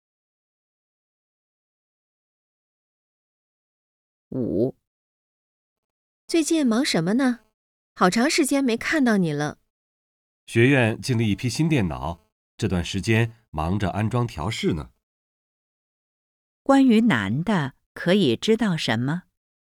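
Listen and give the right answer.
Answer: 他最近忙着安装调试新电脑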